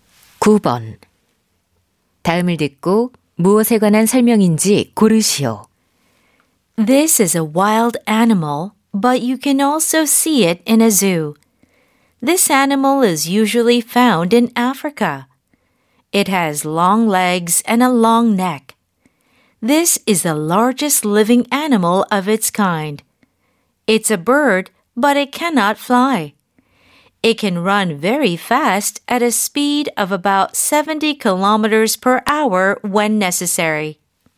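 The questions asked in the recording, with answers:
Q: 다음을 듣고 무엇에 관한 설명인지 고르시오.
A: 타조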